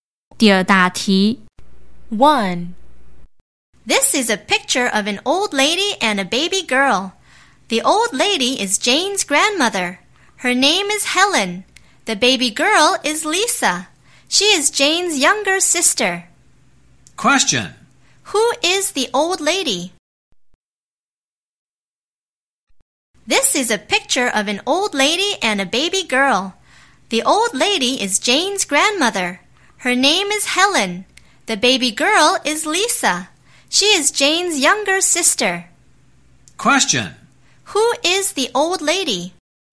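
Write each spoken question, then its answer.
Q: Who is the old lady?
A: Jane's grandmother, Helen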